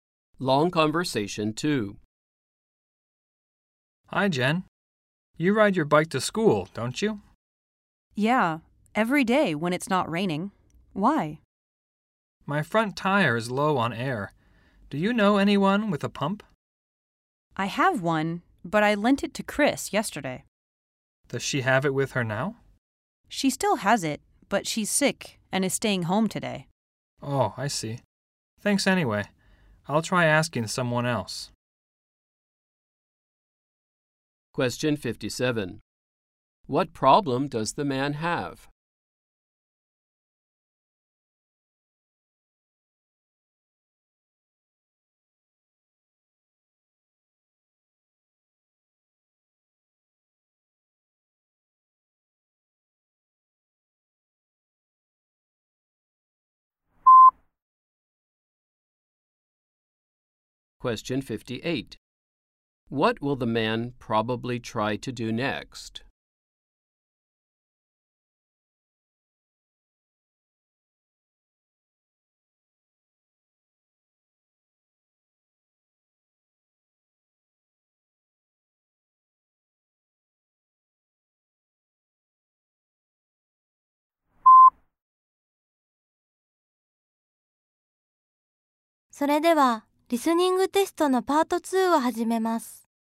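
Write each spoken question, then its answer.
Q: What problem does the man have?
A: His bike's front tire is low on air

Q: What will the man probably try to do next?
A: Ask someone else for a pump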